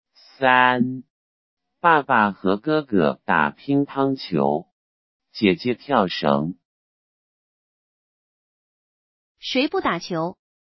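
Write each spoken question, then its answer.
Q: 谁不打球?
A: 姐姐。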